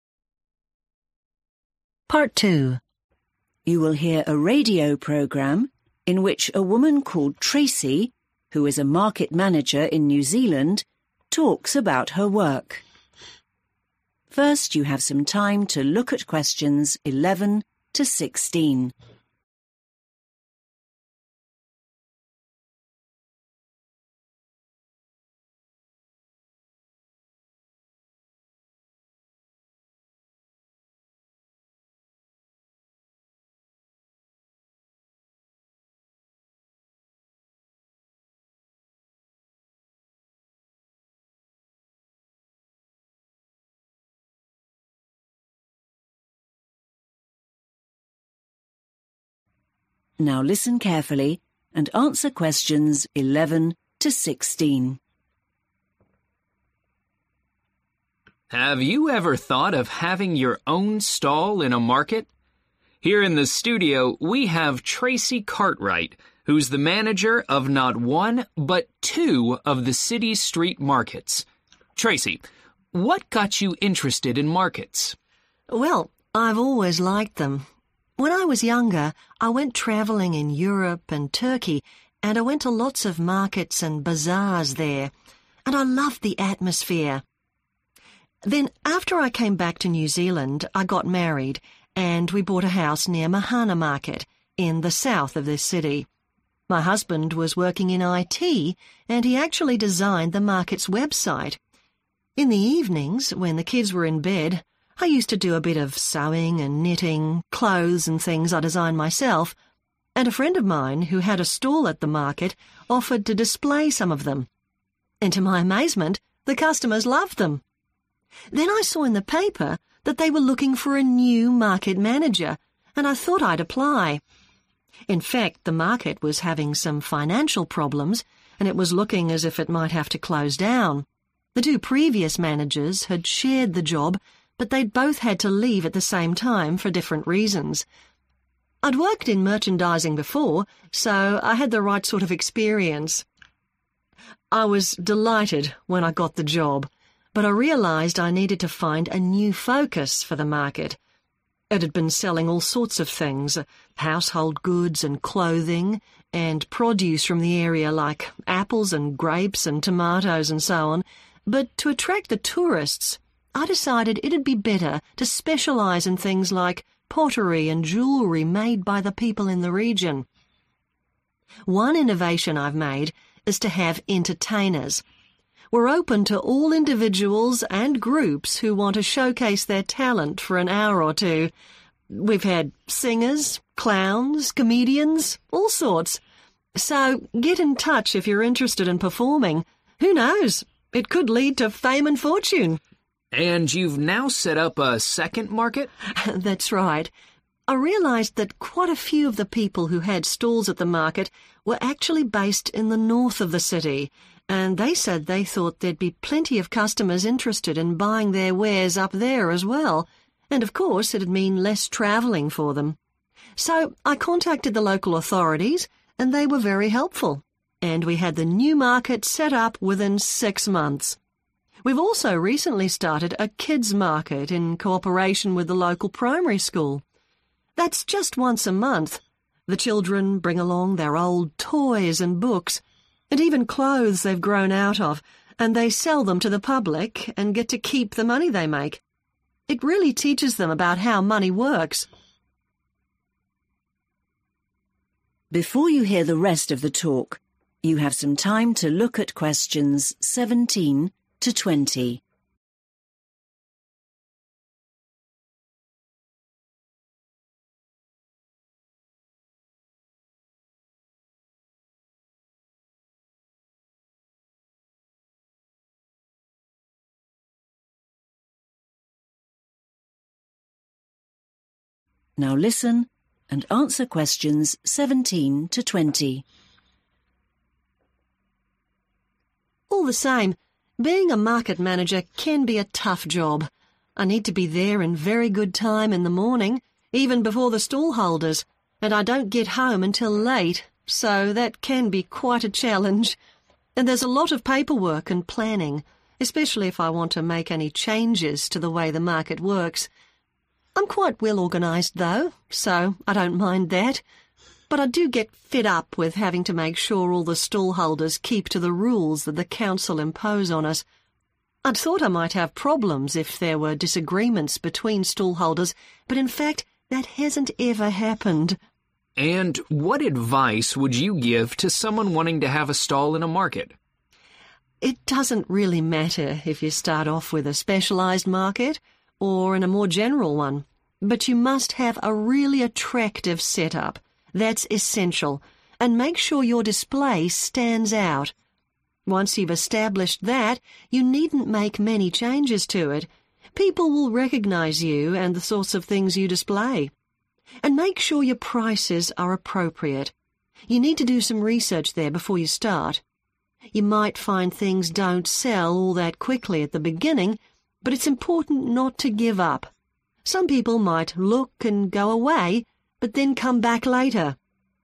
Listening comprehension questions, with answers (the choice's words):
Choose the correct answer.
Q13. How did Tracy change the market's focus?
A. Specialising in regional crafts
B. Selling household goods and clothing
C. Focusing on local produce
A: Specialising in regional crafts

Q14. What is the policy on entertainment at the market?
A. They welcome all performers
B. Only professional entertainers are allowed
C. Entertainment is only on weekends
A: They welcome all performers

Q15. What led to the opening of a second market?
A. From customer feedback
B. From stallholders based in the north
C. From local authorities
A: From stallholders based in the north

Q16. What happens at the kids' market?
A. Children sell handmade crafts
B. Children sell their old items and keep the money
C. Children learn about market management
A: Children sell their old items and keep the money